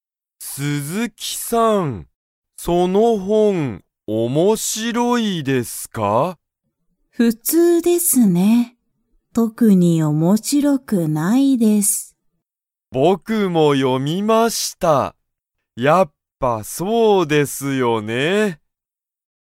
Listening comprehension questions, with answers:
佐藤(さとう)さんはその本(ほん)を読(よ)みましたか?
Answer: はい

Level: Level 1